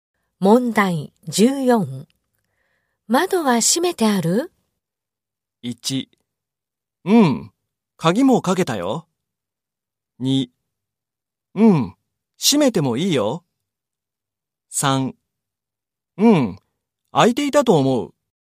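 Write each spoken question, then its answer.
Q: 窓は閉めてある?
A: 1: うん、鍵もかけたよ。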